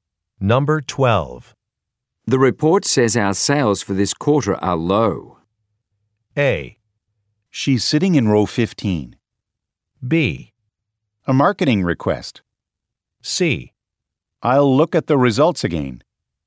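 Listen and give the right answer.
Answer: C: I'll look at the results again.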